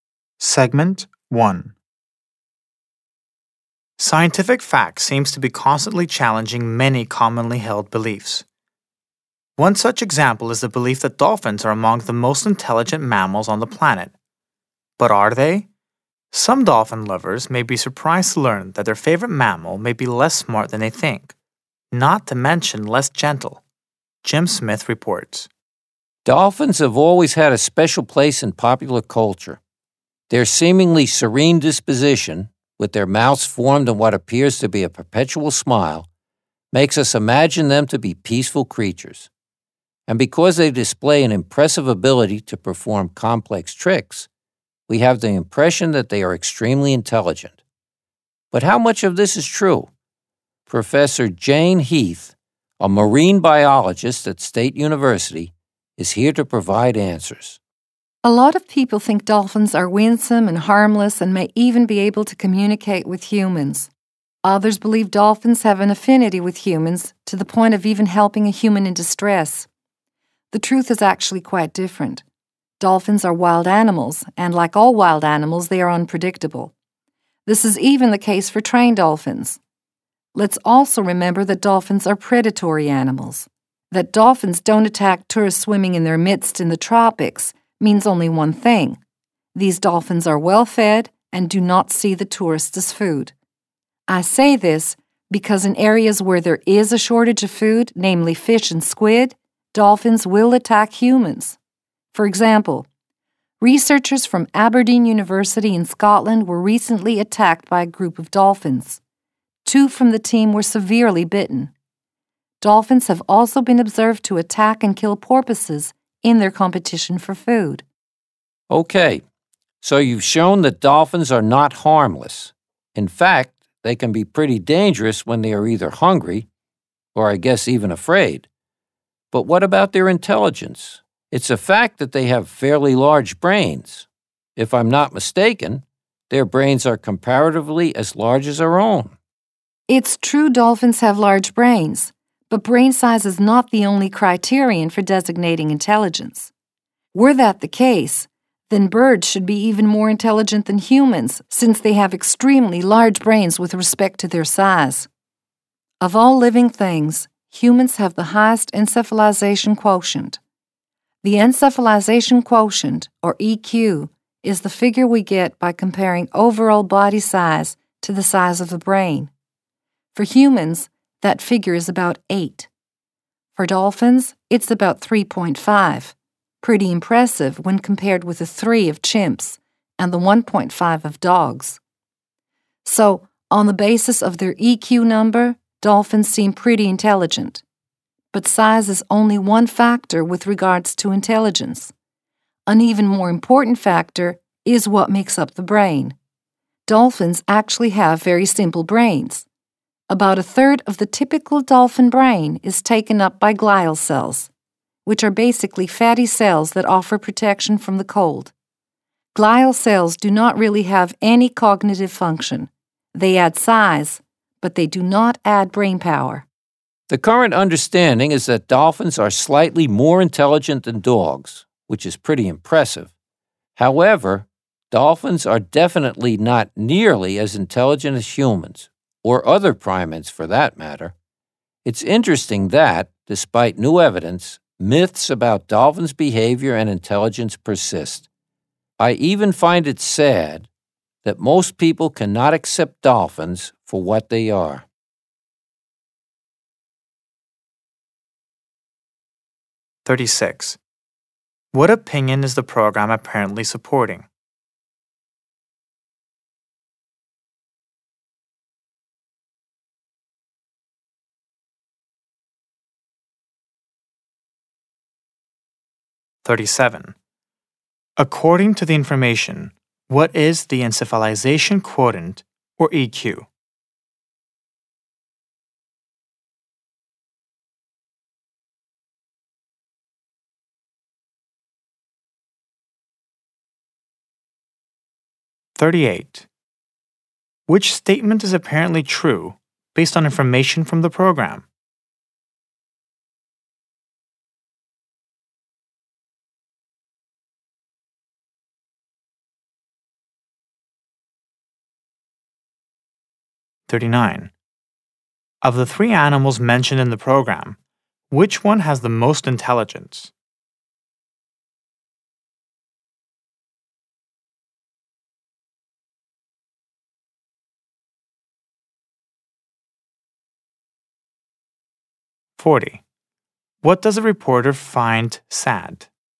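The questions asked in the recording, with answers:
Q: What opinion is the program apparently supporting?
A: Dolphins are less intelligent and less gentle than commonly believed

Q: According to the information, what is the encephalization quotient, or EQ?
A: The figure from comparing overall body size to brain size

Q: What does a reporter find sad?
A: That most people cannot accept dolphins for what they are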